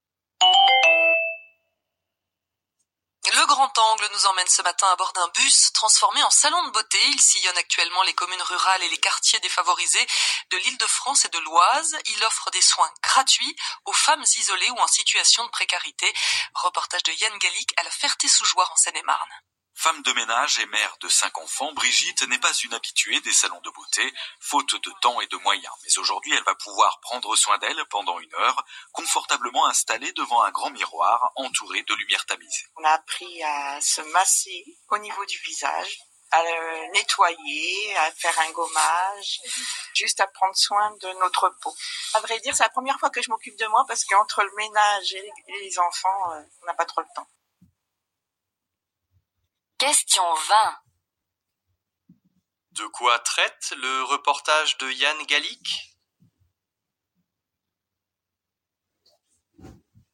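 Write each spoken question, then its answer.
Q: De quoi traite le reportage de Yann Gallic?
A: D'un bus salon de beauté offrant des soins gratuits aux femmes en précarité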